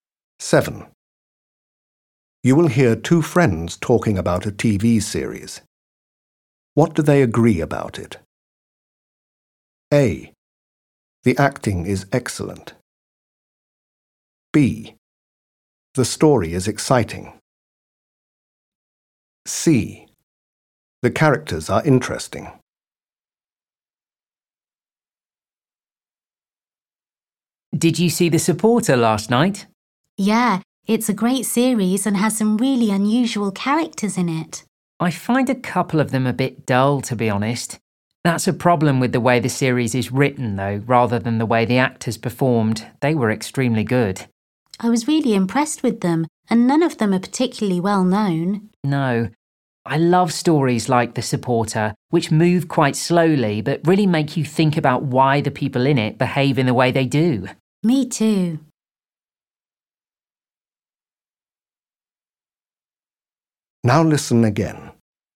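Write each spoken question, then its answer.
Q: What do they agree about it?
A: A: The acting is excellent.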